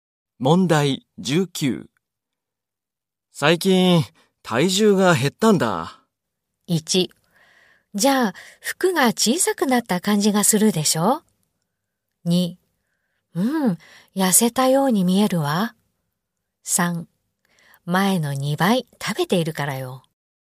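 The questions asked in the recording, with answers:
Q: 最近、体重が減ったんだ。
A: 2: うん、痩せたように見えるわ。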